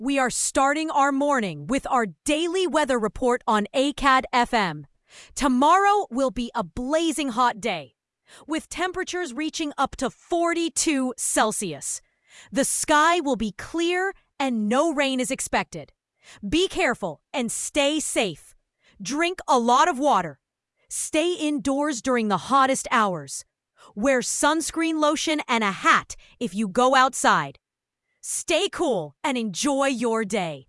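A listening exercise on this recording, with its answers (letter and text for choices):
Listen to these audios and match them with the descriptions below:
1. Weather Announce 5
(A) ☀️ Blazing Hot Day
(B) 🌧️ Heavy Rain and Thunderstorms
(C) 🌨️ Snowstorm Alert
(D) 🌬️ Windy and Dusty Conditions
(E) 🌫️ Cold and Foggy Morning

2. We are starting our morning with our __________ weather report on ACAD FM.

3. Tomorrow will be a blazing hot day, with temperatures __________ up to 42°C.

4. The sky will be clear, and no rain is __________.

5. Stay indoors during the __________ hours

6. Wear sunscreen __________and a hat if you go outside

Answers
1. (A) ☀️ Blazing Hot Day
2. daily
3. reaching
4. expected
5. hottest
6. lotion

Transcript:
Tomorrow will be a blazing hot day, with temperatures reaching up to 38°C. The sky will be clear, and no rain is expected.
Be careful and stay safe!
⦁ Drink a lot of water
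⦁ Stay indoors during the hottest hours
⦁ Wear sunscreen lotion and a hat if you go outside
Stay cool and enjoy your day!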